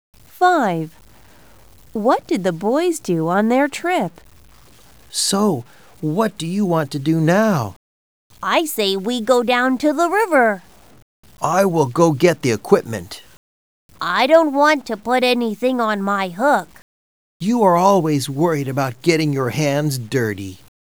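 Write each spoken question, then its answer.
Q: What did the boys do on their trip?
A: They went fishing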